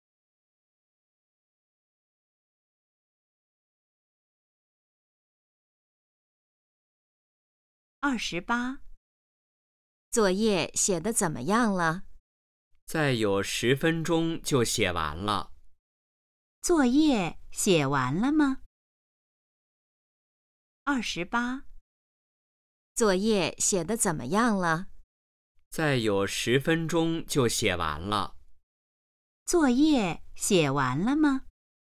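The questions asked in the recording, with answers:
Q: 作业写完了吗?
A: 还没有,再有10分钟就写完了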